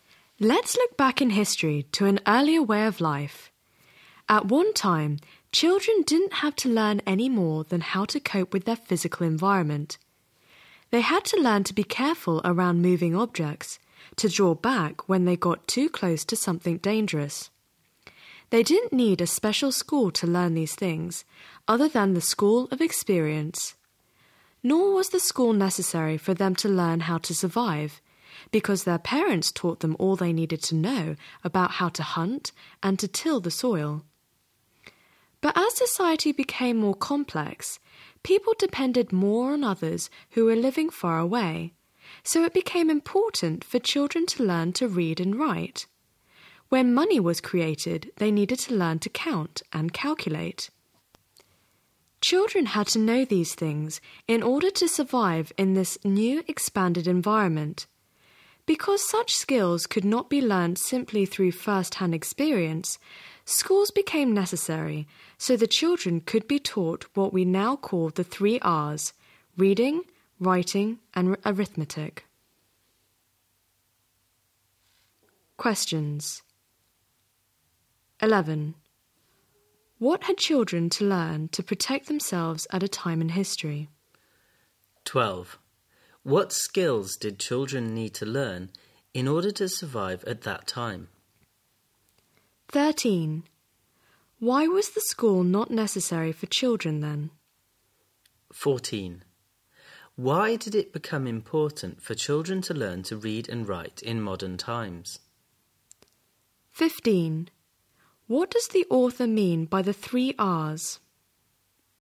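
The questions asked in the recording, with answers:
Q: What had children to learn to protect themselves at a time in history?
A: To be careful around moving objects and draw back from danger

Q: What skills did children need to learn in order to survive at that time?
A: How to hunt and till the soil

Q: Why was the school not necessary for children then?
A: Their parents taught them all they needed to know

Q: Why did it become important for children to learn to read and write in modern times?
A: Society became more complex and people depended on others living far away

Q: What does the author mean by the 3 R's?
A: Reading, writing, and arithmetic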